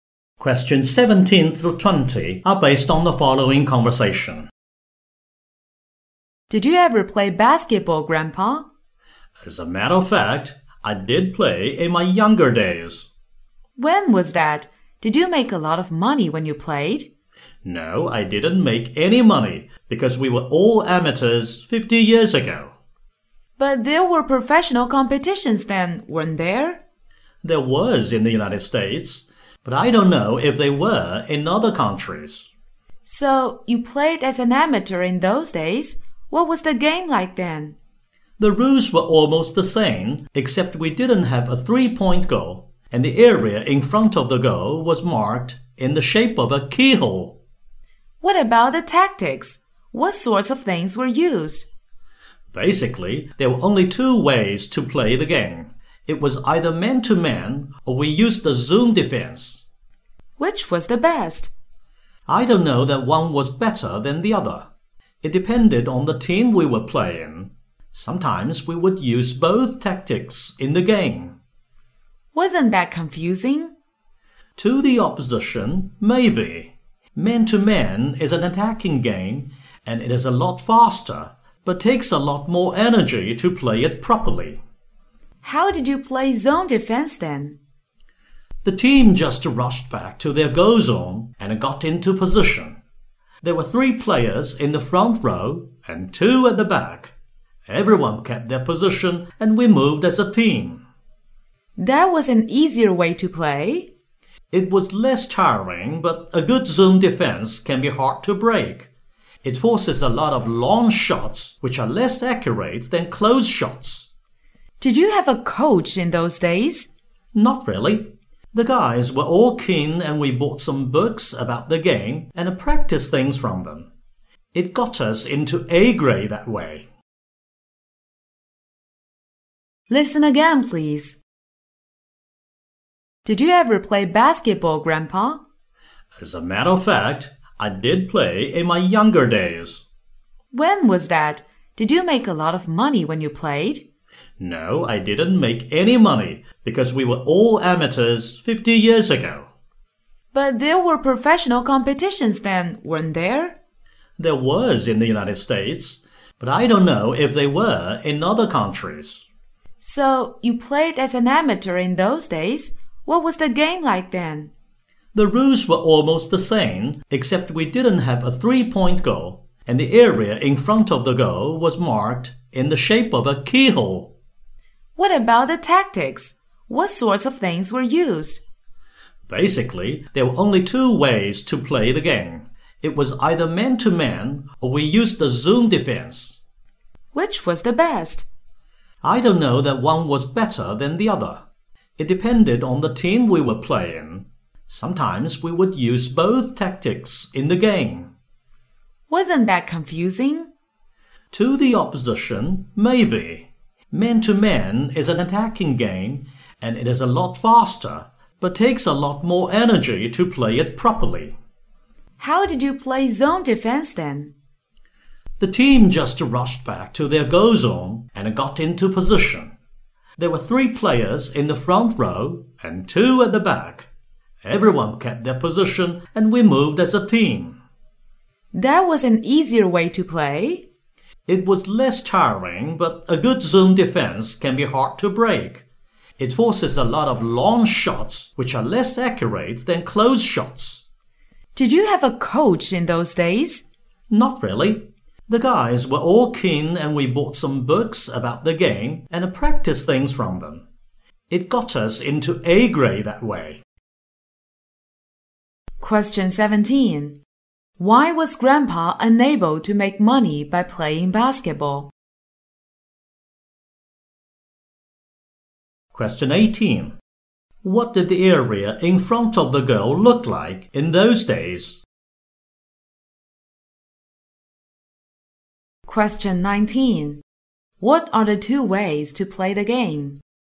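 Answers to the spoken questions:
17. They were all amateurs
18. It was shaped like a keyhole
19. Man-to-man and zone defense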